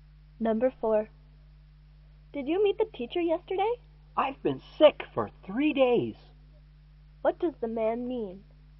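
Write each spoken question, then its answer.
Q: What does the man mean?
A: He didn't meet the teacher because he was sick.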